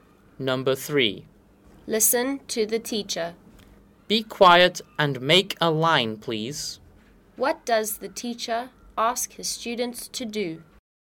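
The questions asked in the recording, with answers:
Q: What does the teacher ask his students to do?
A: Be quiet and make a line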